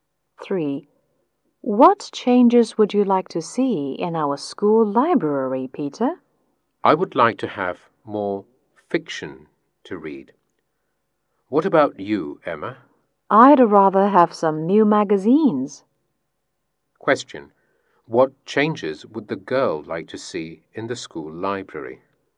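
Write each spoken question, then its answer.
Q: What changes would the girl like to see in the school library?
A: Some new magazines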